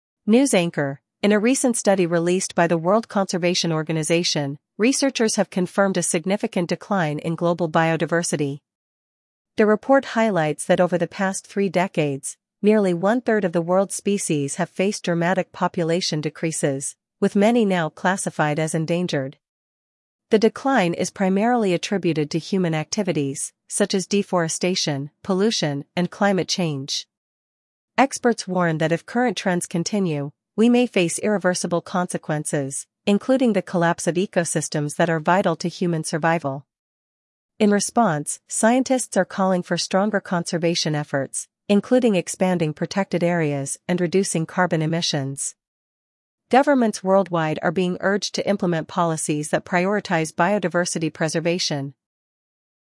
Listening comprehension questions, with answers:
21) What does the recent study confirm?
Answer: A significant decline in global biodiversity.

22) How many species have seen population declines?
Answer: One-third of species.

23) What are the primary causes of biodiversity loss?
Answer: Deforestation, pollution, and climate change.

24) What consequences could occur if current trends continue?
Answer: Collapse of ecosystems vital to human survival.

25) What are scientists recommending to address biodiversity loss?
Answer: Expanding protected areas and reducing carbon emissions.

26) What are governments being urged to do?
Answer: Implement policies prioritizing biodiversity preservation.

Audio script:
News Anchor: In a recent study released by the World Conservation Organization, researchers have confirmed a significant decline in global biodiversity. The report highlights that over the past three decades, nearly one-third of the world's species have faced dramatic population decreases, with many now classified as endangered.
The decline is primarily attributed to human activities, such as deforestation, pollution, and climate change. Experts warn that if current trends continue, we may face irreversible consequences, including the collapse of ecosystems that are vital to human survival.
In response, scientists are calling for stronger conservation efforts, including expanding protected areas and reducing carbon emissions. Governments worldwide are being urged to implement policies that prioritize biodiversity preservation.